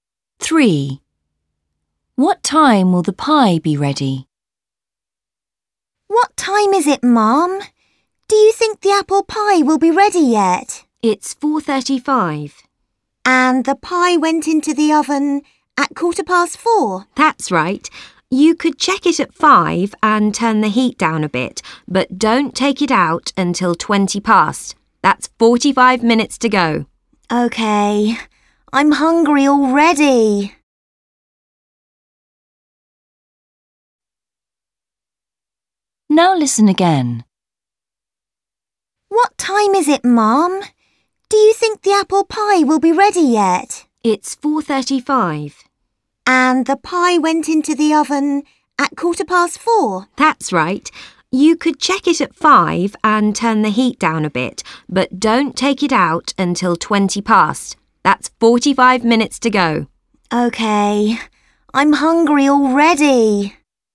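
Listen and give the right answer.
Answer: 5:20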